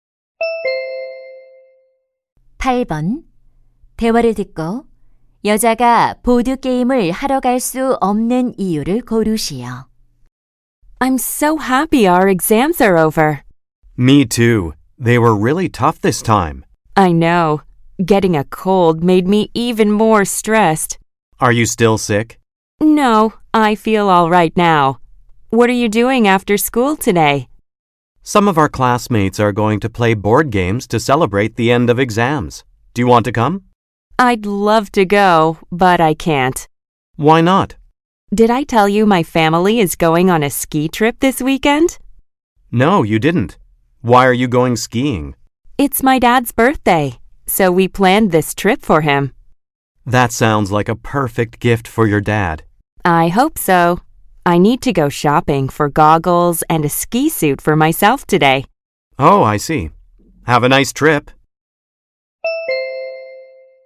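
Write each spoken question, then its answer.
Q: 대화를 듣고 여자가 보드 게임을 하러 갈 수 없는 이유를 고르시오.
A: 스키 여행에 필요한 고글과 스키복을 사러 가야 해서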